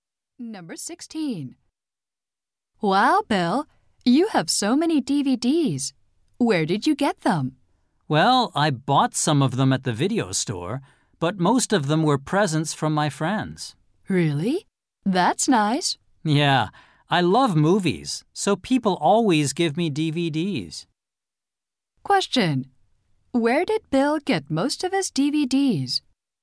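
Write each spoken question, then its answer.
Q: Question. Where did Bill get most of his DVDs?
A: From his friends as presents.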